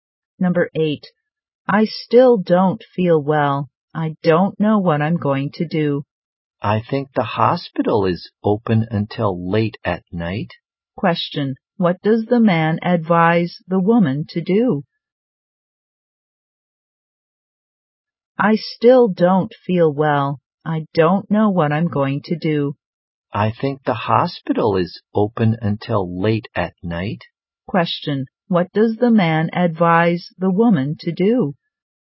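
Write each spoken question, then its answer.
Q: Question, what does the man advise the woman to do?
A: Go to the hospital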